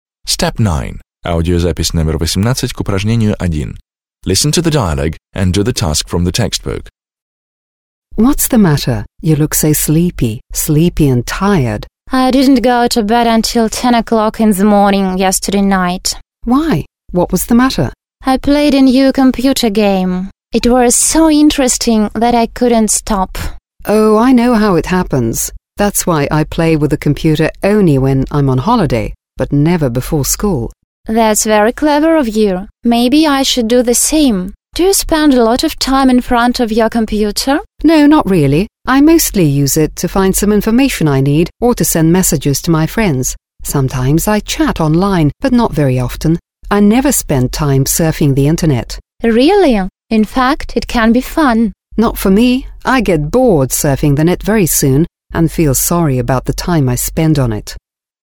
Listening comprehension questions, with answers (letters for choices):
Listen to two friends talking, (18). Complete the sentences (1-4) choosing the appropriate endings.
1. Yesterday night Betty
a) looked sleepy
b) couldn't fall asleep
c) didn't go to bed before midnight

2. Alice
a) practically never plays computer games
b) prefers to play computer games on vacation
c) is very good at playing computer games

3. Betty thinks that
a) Alice is very sensible about playing computer games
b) Alice should spend more time on computer games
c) she must play computer games as much as Alice does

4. Alice explains that she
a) thinks that surfing the Internet can be fun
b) is fond of surfing the Internet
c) thinks surfing the Internet is a waste of time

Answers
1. c
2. b
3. a
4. c

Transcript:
Betty: I didn't go to bed until 10 o'clock in the morning.
Betty: I played a new computer game. It was so interesting that I couldn't stop.
Alice: Oh, I know how it happens. That's why I only play with a computer when I'm on holiday but never before school.
Betty: That's very clever of you. Maybe I should do the same. Do you spend a lot of time in front of your computer?
Alice: No, not really. I mostly use it to find some information I need or to send messages to my friends. Sometimes I chat online but not very often. I never spend time surfing the Internet.

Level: 9 класс